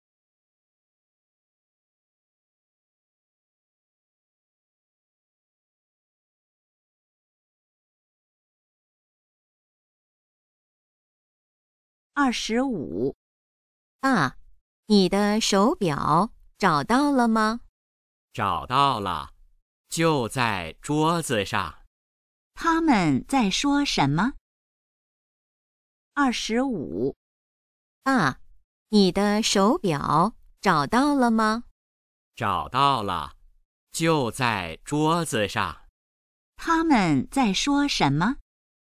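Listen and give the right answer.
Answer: 手表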